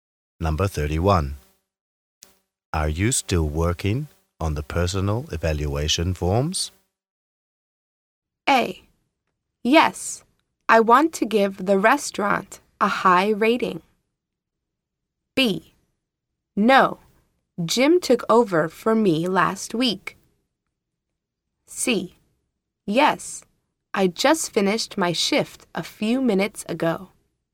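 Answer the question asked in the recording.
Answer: B: No, Jim took over for me last week.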